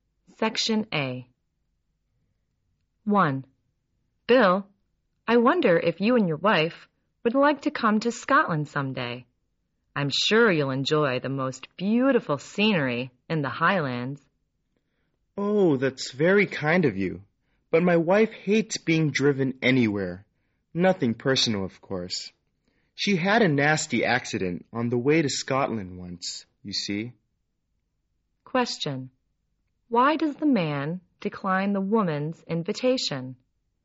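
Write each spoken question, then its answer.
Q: Why does the man decline the woman's invitation?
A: His wife hates being driven since she had a bad accident on the way to Scotland.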